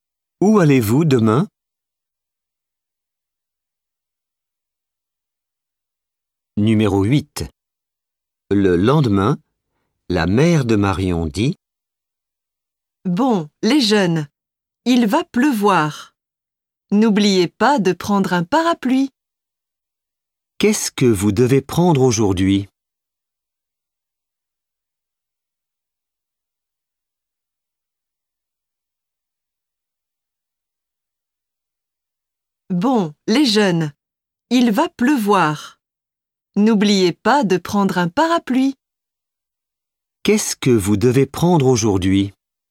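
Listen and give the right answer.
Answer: Un parapluie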